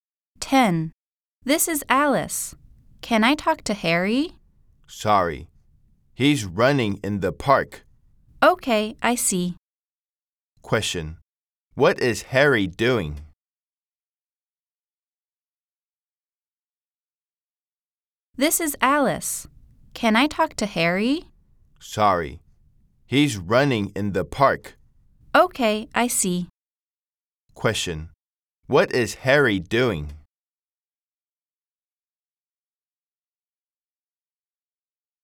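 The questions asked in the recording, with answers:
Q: Question. What is Harry doing?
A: Running in the park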